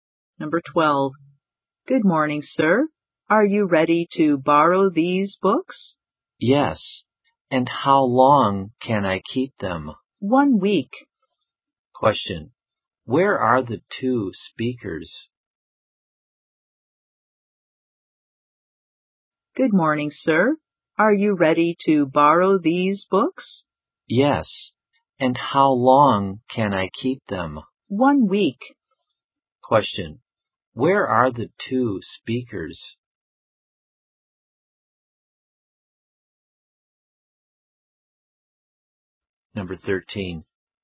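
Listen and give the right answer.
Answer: In a library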